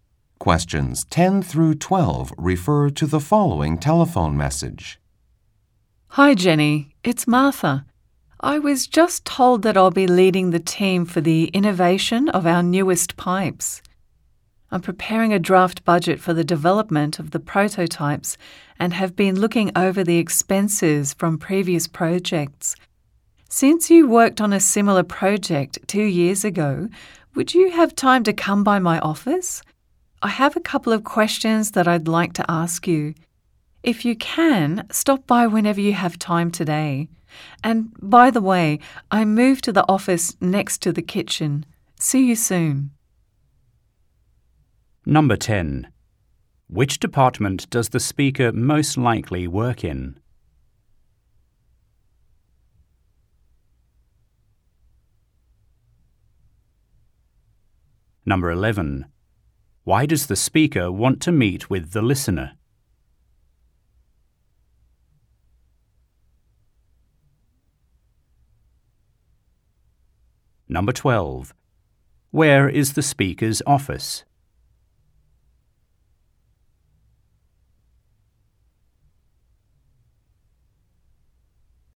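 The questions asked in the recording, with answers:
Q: Why does the speaker want to meet with the listener?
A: To ask questions about a similar past project's expenses for her draft budget

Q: Where is the speaker's office?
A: Next to the kitchen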